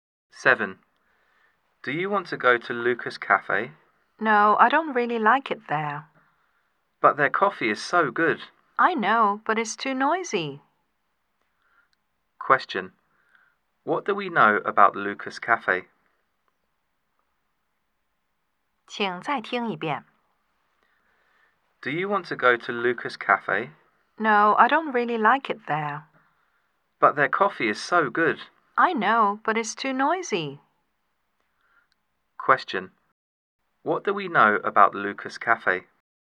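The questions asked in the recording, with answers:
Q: What do we know about Lucas Cafe?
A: Its coffee is good, but it's too noisy.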